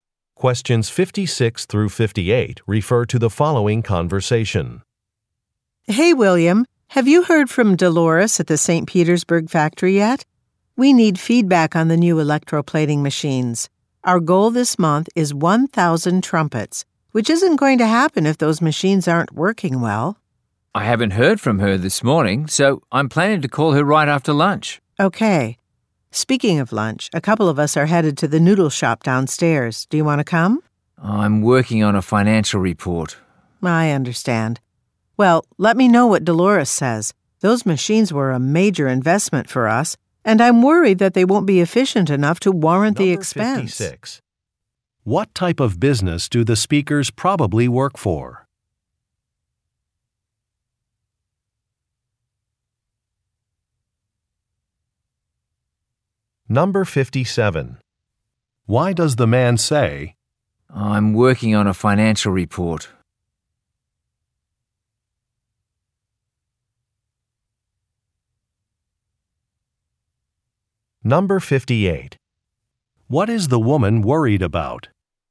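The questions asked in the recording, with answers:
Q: What type of business do the speakers probably work for?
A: A musical instrument manufacturer

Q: Why does the man say, I'm working on a financial report?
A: To decline an invitation to lunch

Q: What is the woman worried about?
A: That the new machines won't be efficient enough to be worth the cost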